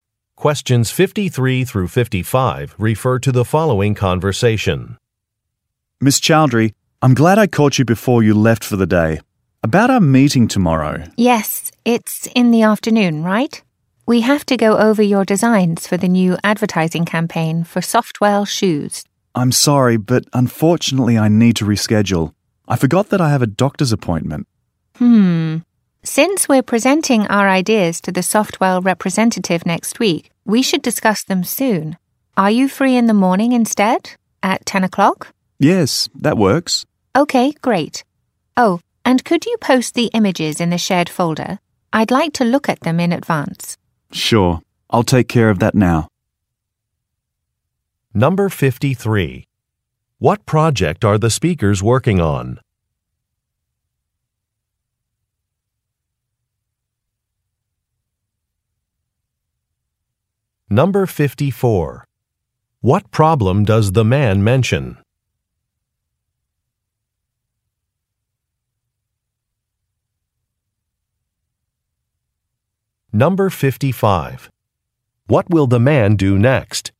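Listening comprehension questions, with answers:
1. What project are the speakers working on?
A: An advertising campaign

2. What problem does the man mention?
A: He has a scheduling conflict.

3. What will the man do next?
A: Share some images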